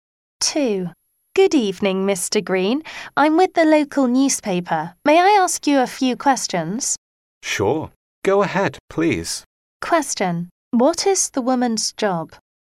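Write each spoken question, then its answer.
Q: What is the woman's job?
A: A reporter for the local newspaper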